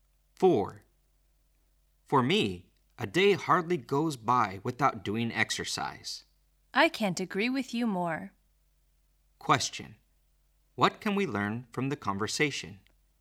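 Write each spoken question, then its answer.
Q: What can we learn from the conversation?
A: Both speakers exercise almost every day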